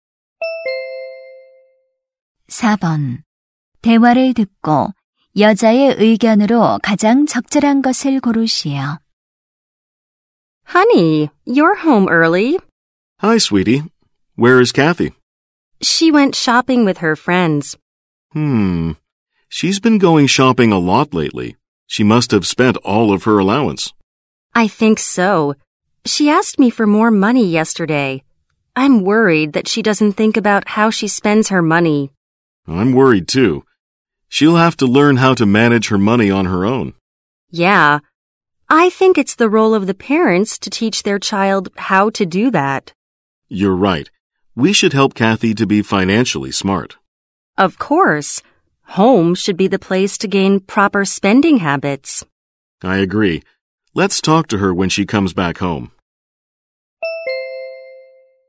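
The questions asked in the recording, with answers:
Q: 대화를 듣고 여자의 의견으로 가장 적절한 것을 고르시오.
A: 부모가 자녀에게 올바른 소비 습관을 가르쳐야 한다.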